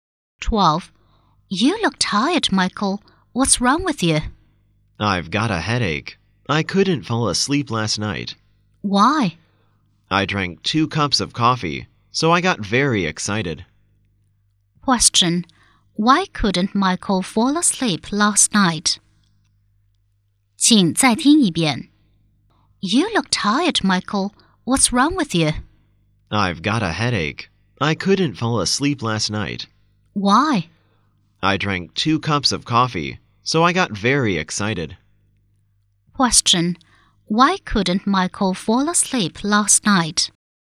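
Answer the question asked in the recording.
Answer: Because he drank 2 cups of coffee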